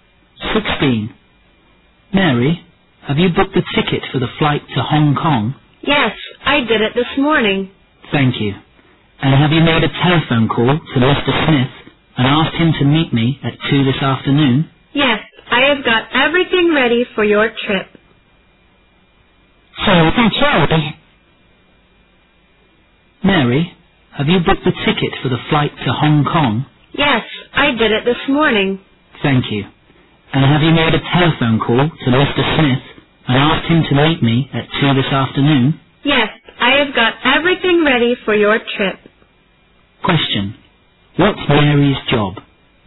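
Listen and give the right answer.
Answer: A secretary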